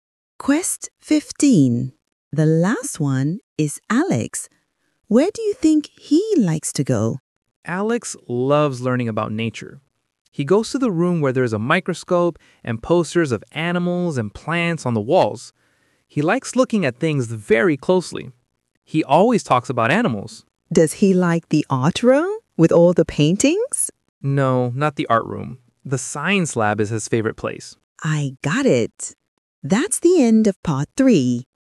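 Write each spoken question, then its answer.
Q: Where do you think he likes to go?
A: the science lab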